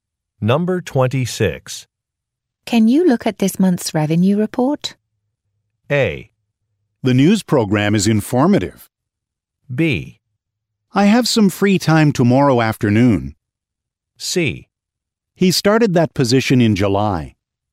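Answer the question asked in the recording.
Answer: B: I have some free time tomorrow afternoon.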